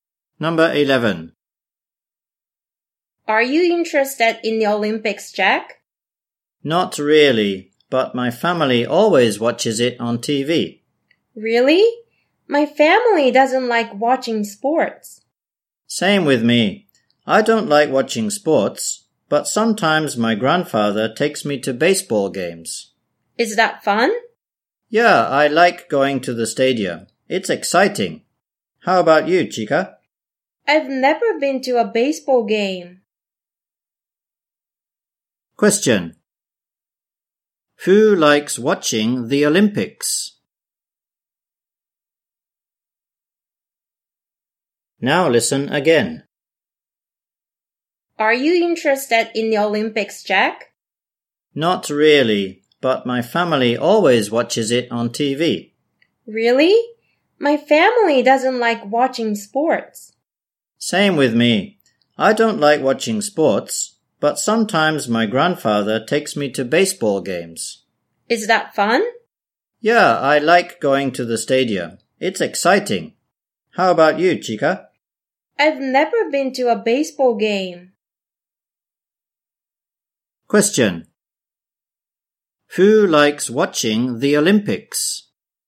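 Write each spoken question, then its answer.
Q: Who likes watching the Olympics?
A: Jack's family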